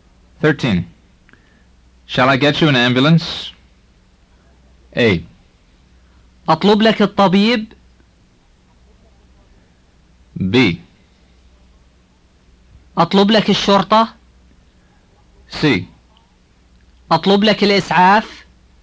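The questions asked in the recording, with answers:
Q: Shall I get you an ambulance?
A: C: أطلب لك الإسعاف.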